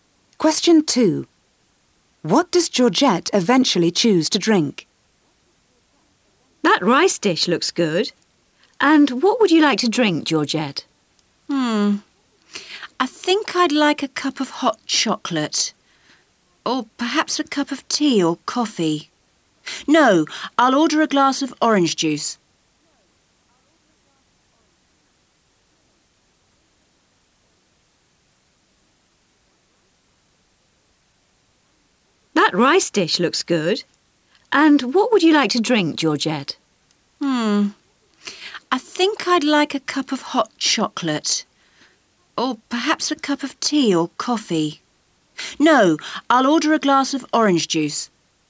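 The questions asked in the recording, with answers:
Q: What does Georgette eventually choose to drink?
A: A glass of orange juice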